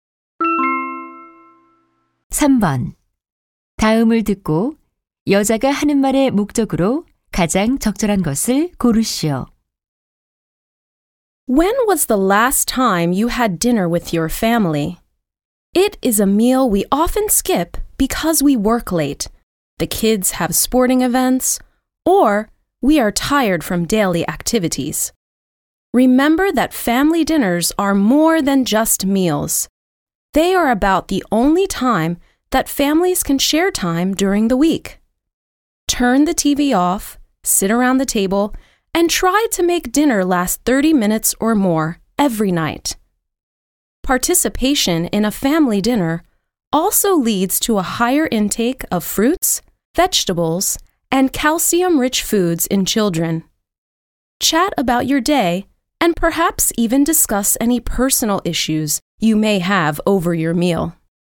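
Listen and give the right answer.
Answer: 가족 저녁 식사를 함께하도록 권장하려고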